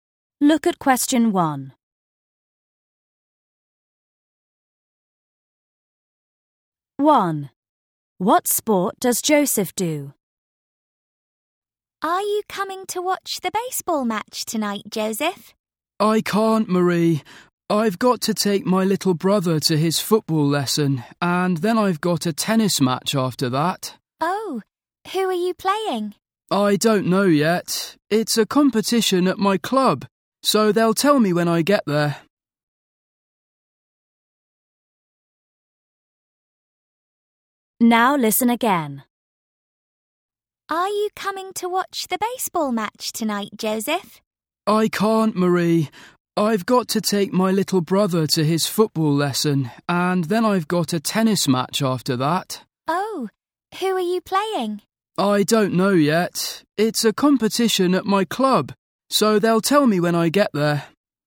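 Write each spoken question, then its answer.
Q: What sport does Joseph do?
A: tennis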